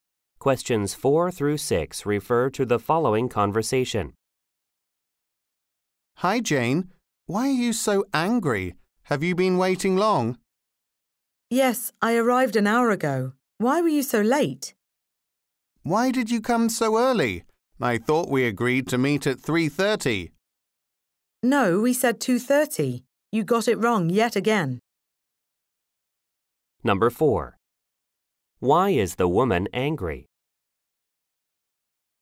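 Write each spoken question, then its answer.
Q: Why is the woman angry?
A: The man arrived late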